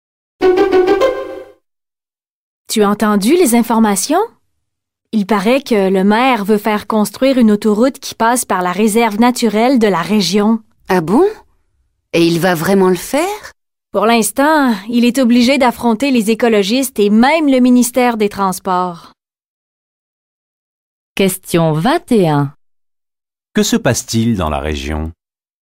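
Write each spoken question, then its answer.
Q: Que se passe-t-il dans la région?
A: Le maire veut construire une autoroute à travers la réserve naturelle.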